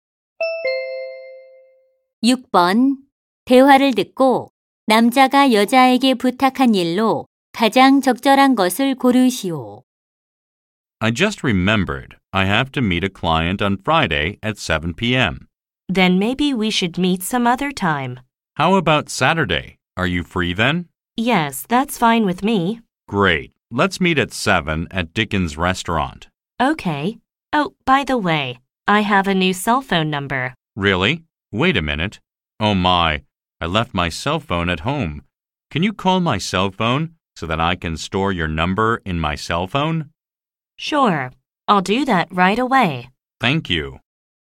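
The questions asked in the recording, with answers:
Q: 남자가 여자에게 부탁한 일로 가장 적절한 것을 고르시오.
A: 자신의 휴대전화로 전화 걸어 주기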